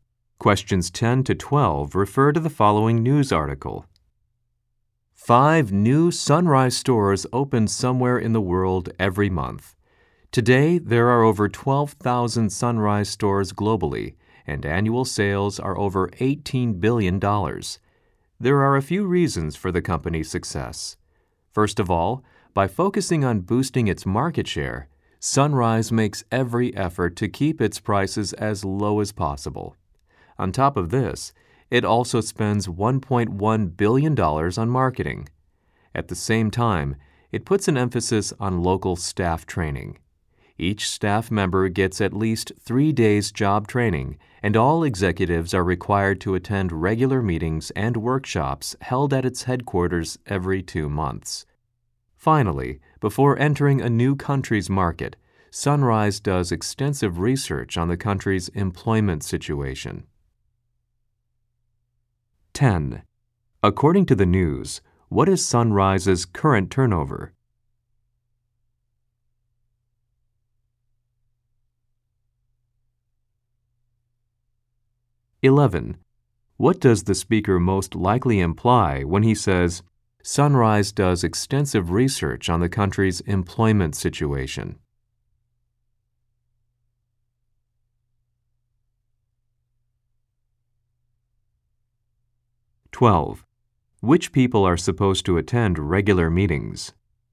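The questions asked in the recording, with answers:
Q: According to the news, what is Sunrise's current turnover?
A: Over $18 billion a year

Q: Which people are supposed to attend regular meetings?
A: All executives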